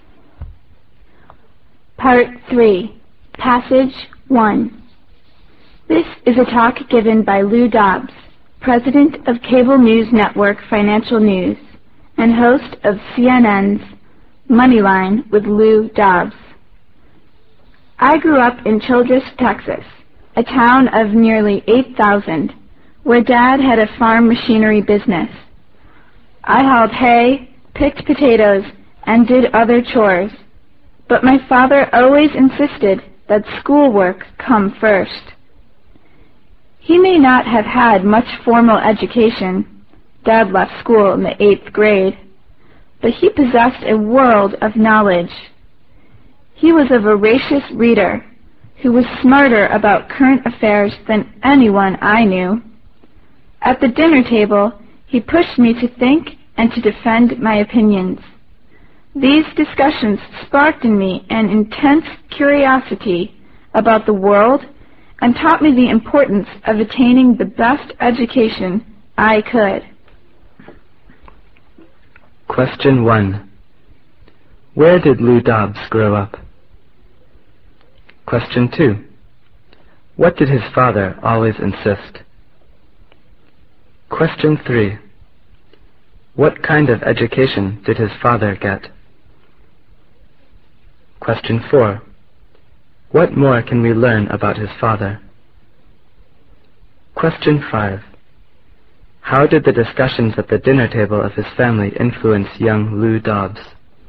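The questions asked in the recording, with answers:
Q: Where did Lou Dobbs grow up?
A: In Childress, Texas

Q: What did his father always insist?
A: That schoolwork come first

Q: What kind of education did his father get?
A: Little formal education; he left school in the 8th grade

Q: What more can we learn about his father?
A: He was a voracious reader, smart about current affairs

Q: How did the discussions at the dinner table of his family influence young Lou Dobbs?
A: They sparked curiosity about the world and taught him the importance of a good education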